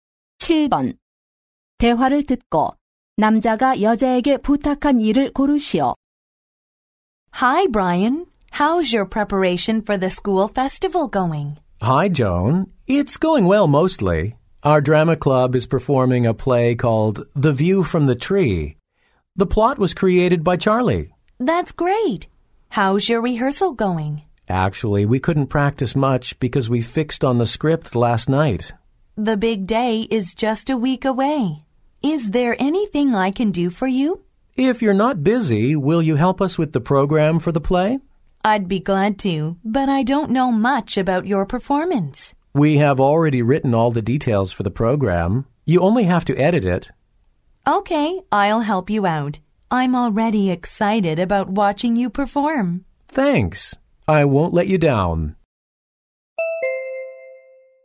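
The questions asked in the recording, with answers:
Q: 대화를 듣고 남자가 여자에게 부탁한 일을 고르시오.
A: 연극 프로그램 편집하기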